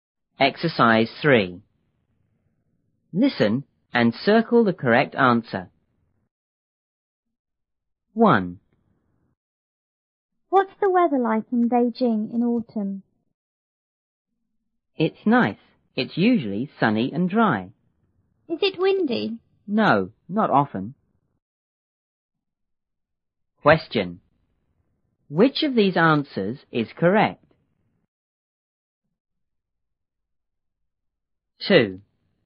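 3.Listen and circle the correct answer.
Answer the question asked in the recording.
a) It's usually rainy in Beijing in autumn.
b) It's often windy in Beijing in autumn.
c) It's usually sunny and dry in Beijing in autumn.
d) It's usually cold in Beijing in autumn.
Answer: c) It's usually sunny and dry in Beijing in autumn.

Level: 六年级下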